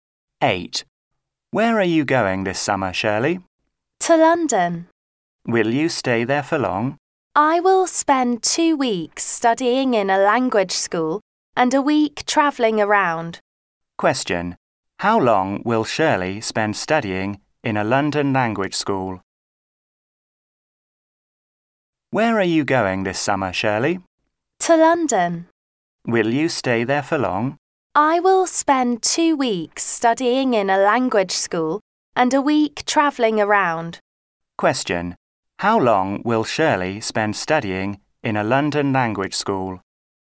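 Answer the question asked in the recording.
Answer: 2 weeks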